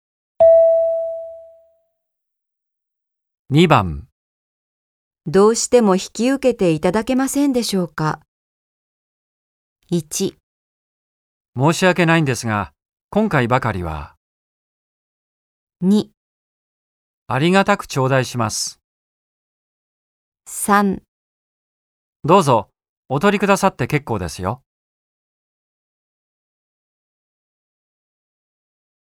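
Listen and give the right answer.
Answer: 1: 申し訳ないんですが、今回ばかりは。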